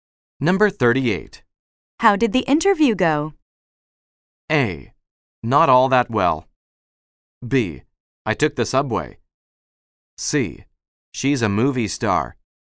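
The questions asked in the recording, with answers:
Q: How did the interview go?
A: A: Not all that well.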